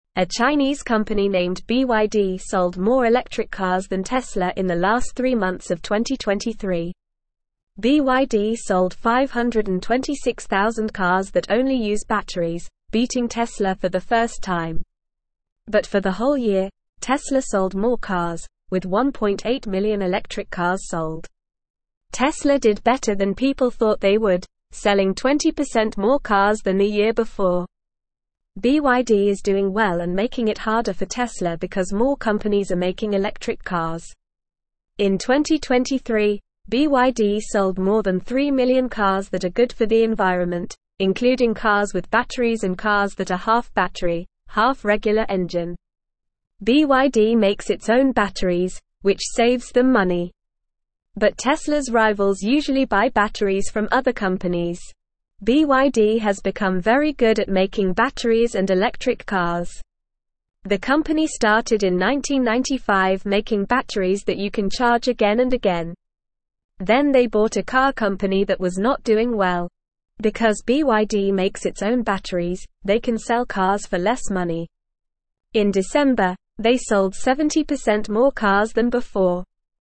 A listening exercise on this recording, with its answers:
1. A Chinese company named BYD (1)______ (2)______ electric cars than Tesla in the last three months of 2023.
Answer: sold

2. A Chinese company named BYD (1)______ (2)______ electric cars than Tesla in the last three months of 2023.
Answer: more

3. BYD sold 526,000 cars that only use (3)______, beating Tesla for the first time.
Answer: batteries

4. Tesla did better than (4)______ thought they would, selling 20% more cars than the year before.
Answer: people

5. BYD is (5)______ well and (6)______ it harder for Tesla because more companies are making electric cars.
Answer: doing

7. In 2023, BYD sold more than 3 million cars that are good for the environment, (7)______ cars with batteries and cars that are half battery, half (8)______ engine.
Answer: including

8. In 2023, BYD sold more than 3 million cars that are good for the environment, (7)______ cars with batteries and cars that are half battery, half (8)______ engine.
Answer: regular

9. But Tesla's rivals usually buy batteries from (9)______ companies.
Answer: other

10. BYD has become very good at making batteries and electric (10)______.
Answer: cars

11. The company started in 1995 making batteries that you can (11)______ again and again.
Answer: charge

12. Because BYD makes its own batteries, they can sell cars for less (12)______.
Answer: money

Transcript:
A Chinese company named BYD sold more electric cars than Tesla in the last three months of 2023. BYD sold 526,000 cars that only use batteries, beating Tesla for the first time. But for the whole year, Tesla sold more cars, with 1.8 million electric cars sold. Tesla did better than people thought they would, selling 20% more cars than the year before.
BYD is doing well and making it harder for Tesla because more companies are making electric cars. In 2023, BYD sold more than 3 million cars that are good for the environment, including cars with batteries and cars that are half battery, half regular engine. BYD makes its own batteries, which saves them money. But Tesla's rivals usually buy batteries from other companies.
BYD has become very good at making batteries and electric cars. The company started in 1995 making batteries that you can charge again and again. Then they bought a car company that was not doing well. Because BYD makes its own batteries, they can sell cars for less money. In December, they sold 70% more cars than before.

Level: Level 2